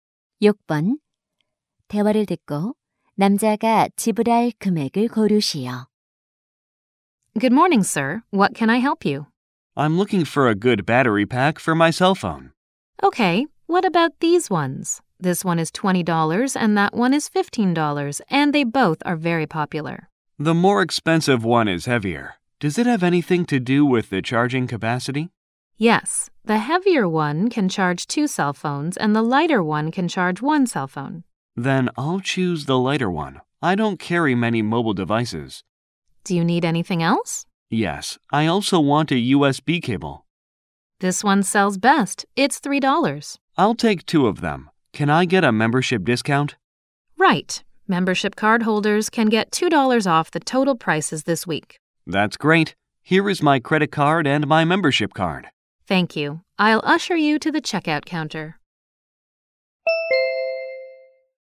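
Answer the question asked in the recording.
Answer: $19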